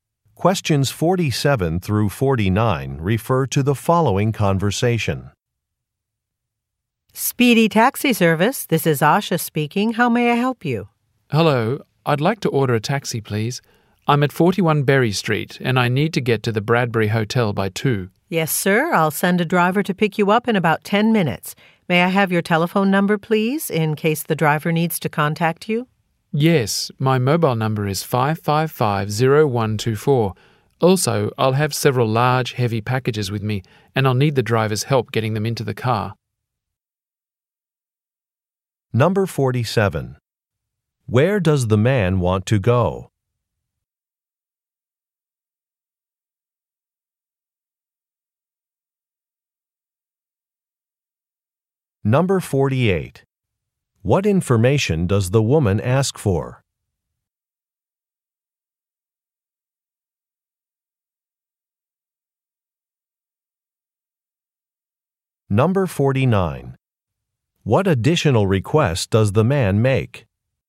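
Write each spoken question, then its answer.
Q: Where does the man want to go?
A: The Bradbury Hotel

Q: What information does the woman ask for?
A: His telephone number

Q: What additional request does the man make?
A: Help loading heavy packages into the car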